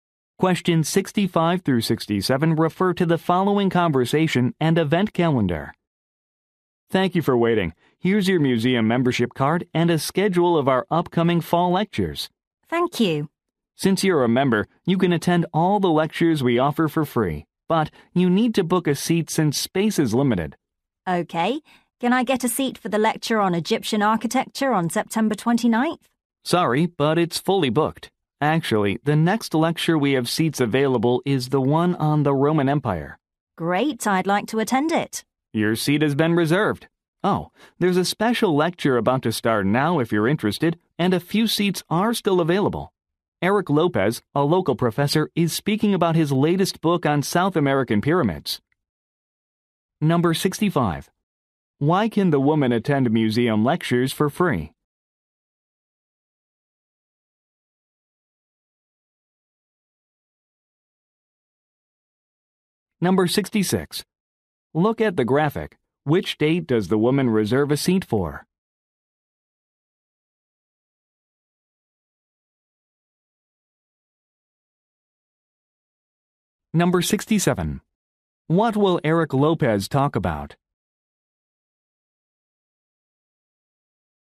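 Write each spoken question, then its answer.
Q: Why can the woman attend museum lectures for free?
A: She is a museum member

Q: What will Eric Lopez talk about?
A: His latest book on South American pyramids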